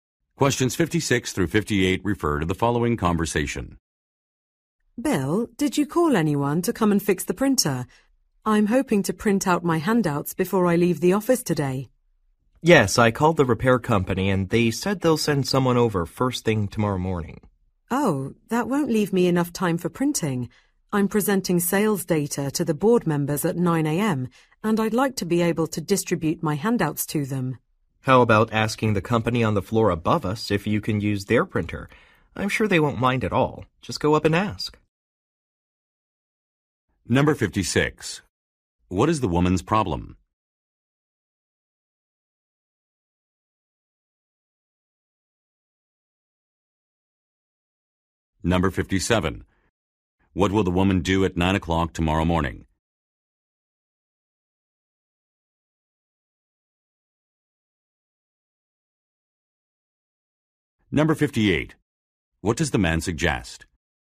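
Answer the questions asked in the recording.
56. The printer is broken and she needs to print handouts
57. Present sales data to the board members
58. Using the printer of the company on the floor above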